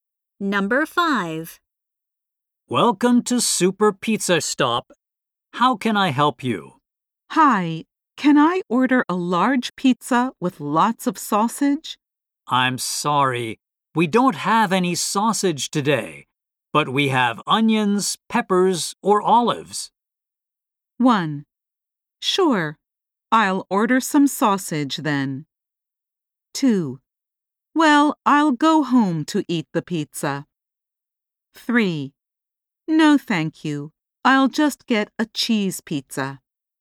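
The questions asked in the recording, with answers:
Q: I'm sorry, we don't have any sausage today, but we have onions, peppers, or olives.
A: 3: No, thank you. I'll just get a cheese pizza.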